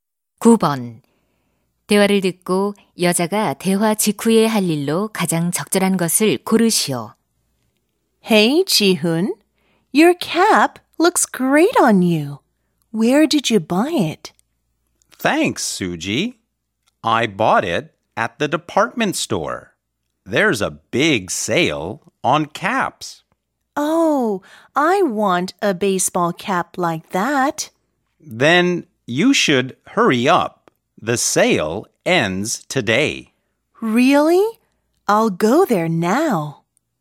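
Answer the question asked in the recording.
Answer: 백화점에 모자 사러 가기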